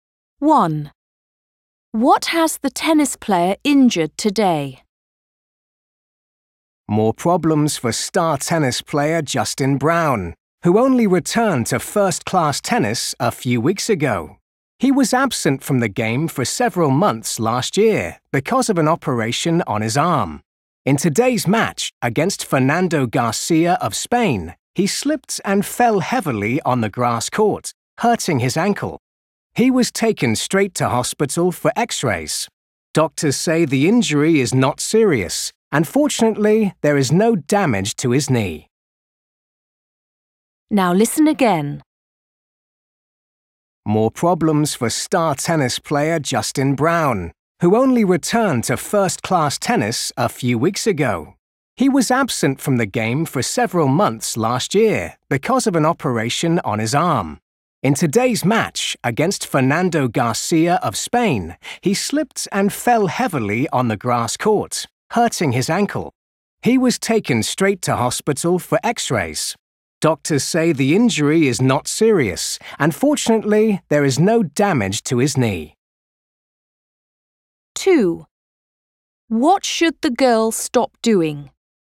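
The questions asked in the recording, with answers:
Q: What has the tennis player injured today?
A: His ankle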